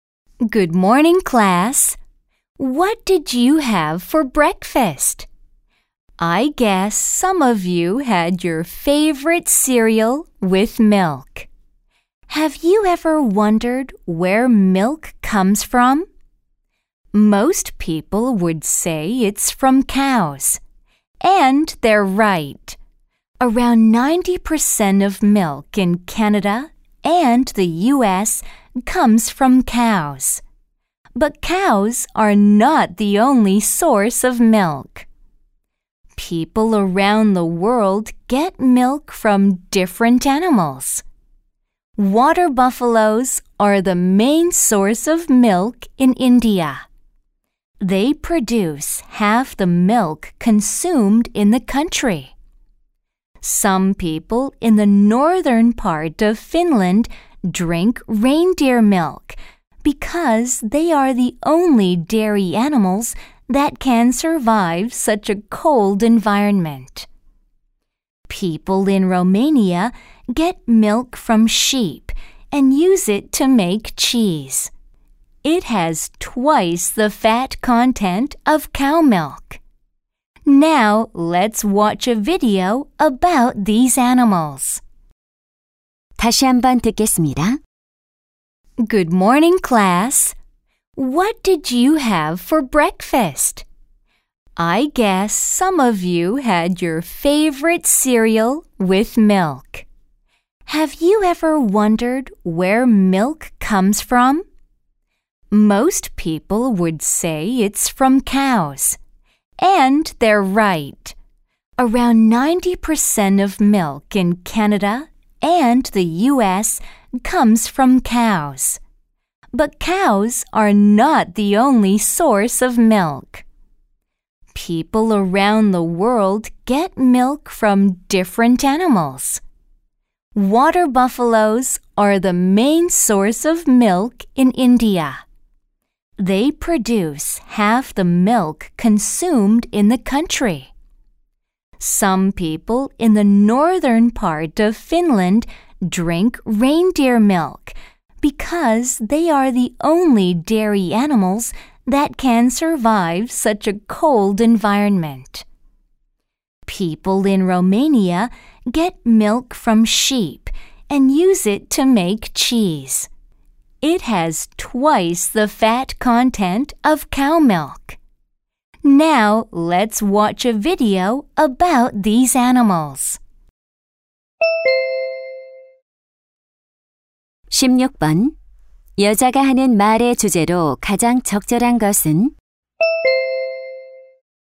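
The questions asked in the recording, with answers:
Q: 여자가 하는 말의 주제로 가장 적절한 것은?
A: 세계 여러 지역에서 우유를 얻는 다양한 동물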